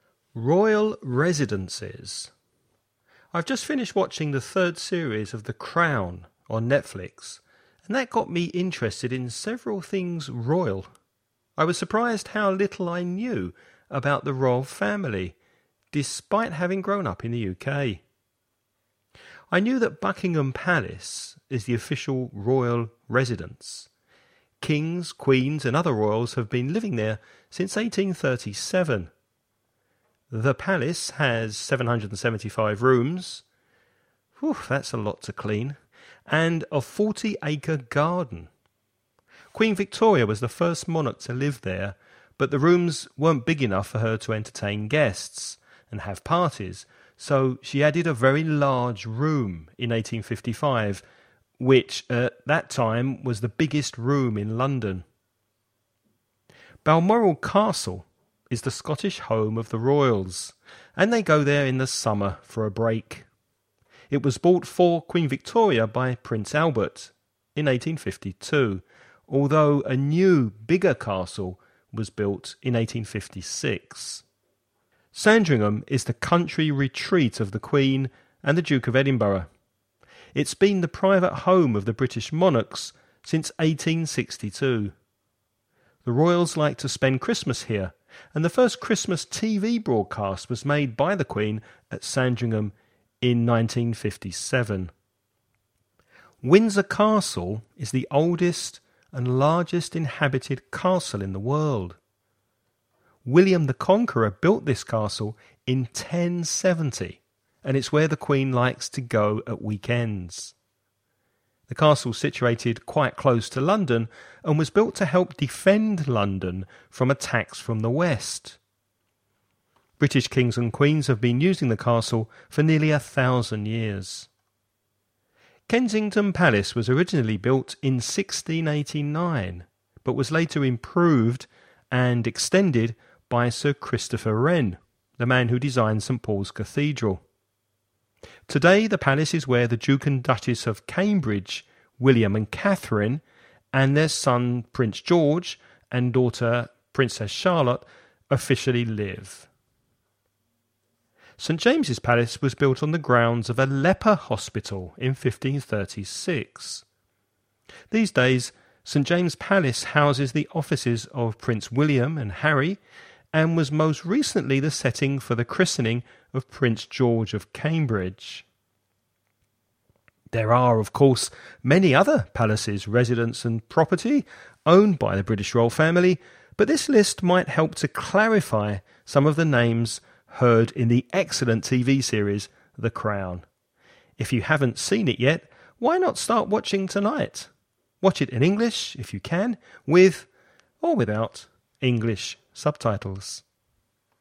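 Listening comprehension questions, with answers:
Listen and write the questions you hear.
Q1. How many rooms does Buckingham Palace have?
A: 775

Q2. Where in the UK is Balmoral Castle?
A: Scotland

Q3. In which year did the Queen make the first televised Christmas message?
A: 1957

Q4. Which residence was built in the year 1070?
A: Windsor Castle

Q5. What used to stand on the grounds of St. James's Palace before it was built?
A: A leper hospital

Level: nivel avanzado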